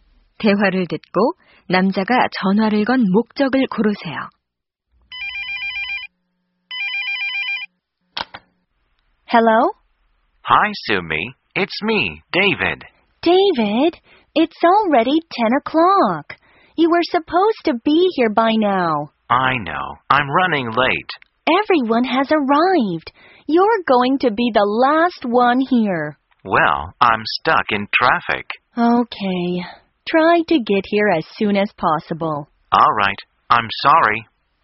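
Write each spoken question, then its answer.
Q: 대화를 듣고 남자가 전화를 건 목적을 고르세요.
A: 늦는다고 알리려고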